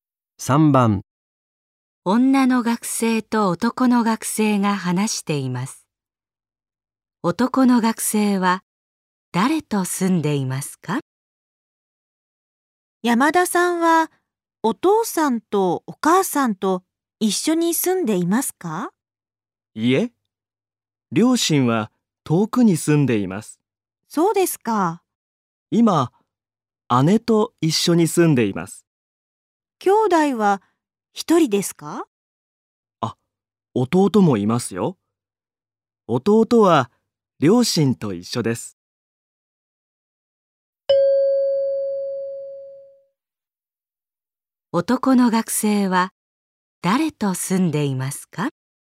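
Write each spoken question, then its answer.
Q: 男の学生は誰と住んでいますか?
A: お姉さん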